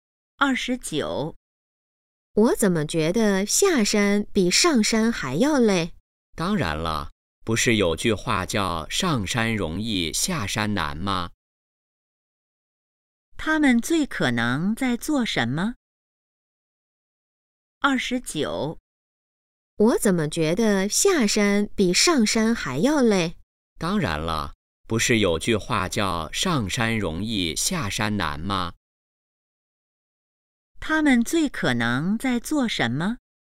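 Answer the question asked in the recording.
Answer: 爬山(下山)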